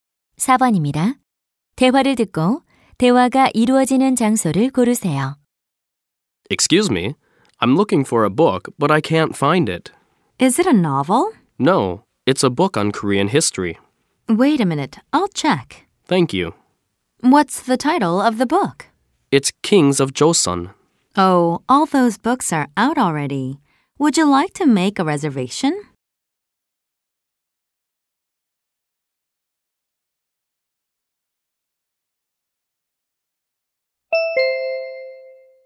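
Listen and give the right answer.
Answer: 도서관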